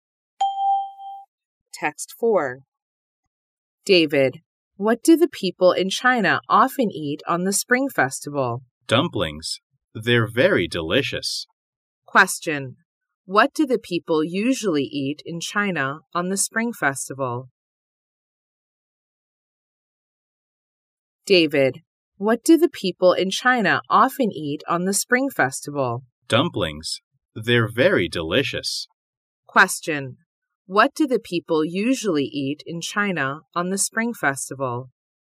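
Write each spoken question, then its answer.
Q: What do the people usually eat in China on the Spring Festival?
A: Dumplings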